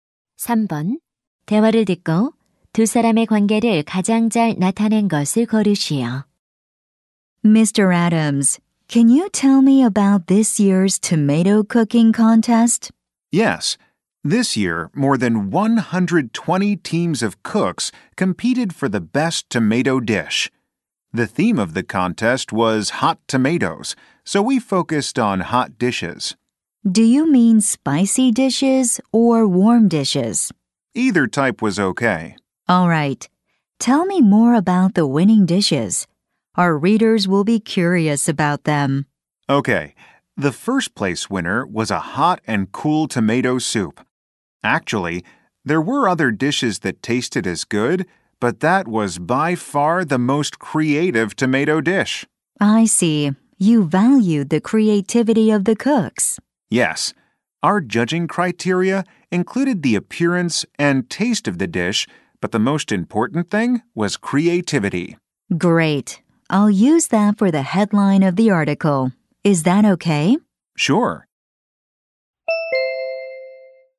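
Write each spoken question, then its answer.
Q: 대화를 듣고 두 사람의 관계를 가장 잘 나타낸 것을 고르시오.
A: 기자 - 요리 대회 심사위원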